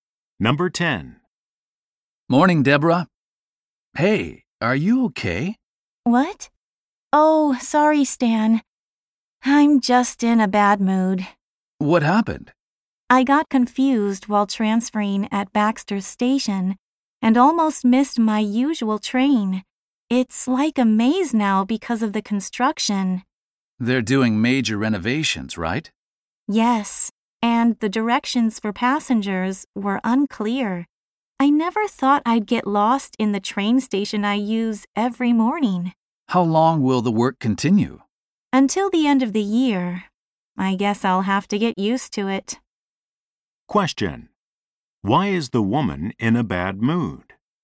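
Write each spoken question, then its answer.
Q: Why is the woman in a bad mood?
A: She got confused at the station under construction and almost missed her train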